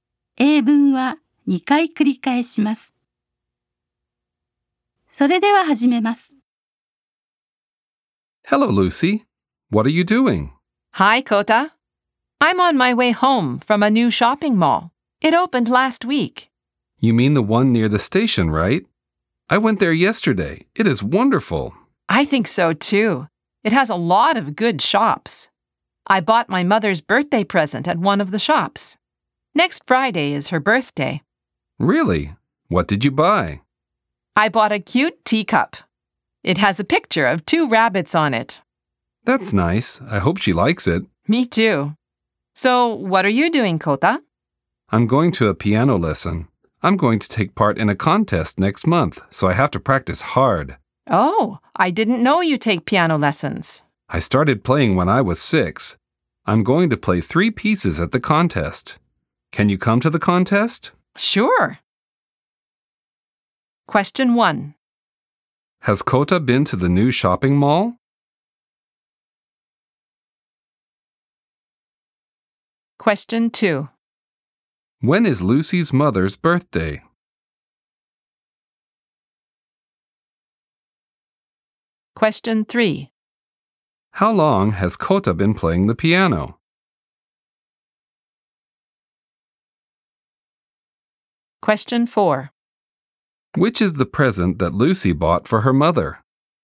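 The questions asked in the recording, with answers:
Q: Has Kota been to the new shopping mall?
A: Yes, he has (he went yesterday)

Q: When is Lucy's mother's birthday?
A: Next Friday

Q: How long has Kota been playing the piano?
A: Since he was six

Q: Which is the present that Lucy bought for her mother?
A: A teacup with a picture of two rabbits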